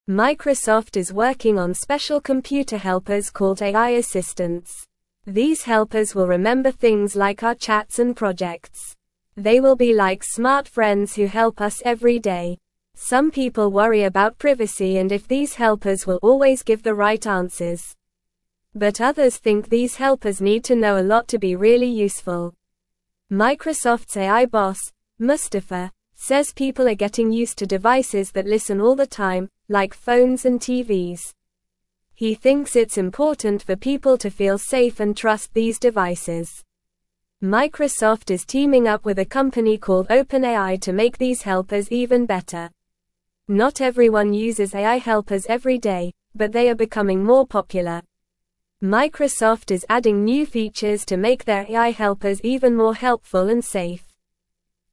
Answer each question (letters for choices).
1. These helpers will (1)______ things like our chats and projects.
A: remember

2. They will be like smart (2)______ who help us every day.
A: friends

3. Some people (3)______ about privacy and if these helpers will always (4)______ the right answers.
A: worry

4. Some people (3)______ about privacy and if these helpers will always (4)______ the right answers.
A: give

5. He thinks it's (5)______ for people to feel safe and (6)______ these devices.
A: important

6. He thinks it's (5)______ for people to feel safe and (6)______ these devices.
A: trust

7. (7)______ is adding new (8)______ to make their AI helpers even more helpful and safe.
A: Microsoft

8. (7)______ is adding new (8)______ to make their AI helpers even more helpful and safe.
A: features

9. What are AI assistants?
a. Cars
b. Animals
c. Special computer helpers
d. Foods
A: c

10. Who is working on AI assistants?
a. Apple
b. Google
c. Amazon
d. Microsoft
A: d

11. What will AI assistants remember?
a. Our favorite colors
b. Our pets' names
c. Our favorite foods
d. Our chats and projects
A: d

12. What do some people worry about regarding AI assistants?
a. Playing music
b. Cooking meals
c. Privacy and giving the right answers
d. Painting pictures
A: c

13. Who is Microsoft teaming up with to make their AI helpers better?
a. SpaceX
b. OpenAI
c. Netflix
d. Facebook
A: b

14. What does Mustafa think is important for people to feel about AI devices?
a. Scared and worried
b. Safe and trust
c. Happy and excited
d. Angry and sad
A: b

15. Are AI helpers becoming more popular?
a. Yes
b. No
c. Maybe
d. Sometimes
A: a

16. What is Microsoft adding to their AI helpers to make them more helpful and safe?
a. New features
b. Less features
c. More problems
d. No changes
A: a

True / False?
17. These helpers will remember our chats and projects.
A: True

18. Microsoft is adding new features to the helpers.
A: True

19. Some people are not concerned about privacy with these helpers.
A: False

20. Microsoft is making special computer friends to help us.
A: True

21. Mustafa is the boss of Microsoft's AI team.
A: True

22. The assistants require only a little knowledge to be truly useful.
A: False

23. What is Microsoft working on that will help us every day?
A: Microsoft is working on special computer helpers called AI assistants.

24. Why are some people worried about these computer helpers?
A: Some people worry about privacy and if these helpers will always give the right answers.

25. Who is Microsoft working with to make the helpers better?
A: Microsoft is working with a company called OpenAI to make the helpers better.

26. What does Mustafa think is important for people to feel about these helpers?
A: Mustafa thinks it's important for people to feel safe and trust these helpers.

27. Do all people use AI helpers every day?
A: Not all people use AI helpers every day, but they are becoming more popular.

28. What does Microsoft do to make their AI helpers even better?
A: Microsoft adds new features to make their AI helpers even more helpful and safe.

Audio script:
Microsoft is working on special computer helpers called AI assistants. These helpers will remember things like our chats and projects. They will be like smart friends who help us every day. Some people worry about privacy and if these helpers will always give the right answers. But others think these helpers need to know a lot to be really useful.
Microsoft's AI boss, Mustafa, says people are getting used to devices that listen all the time, like phones and TVs. He thinks it's important for people to feel safe and trust these devices. Microsoft is teaming up with a company called OpenAI to make these helpers even better. Not everyone uses AI helpers every day, but they are becoming more popular. Microsoft is adding new features to make their AI helpers even more helpful and safe.

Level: Level 1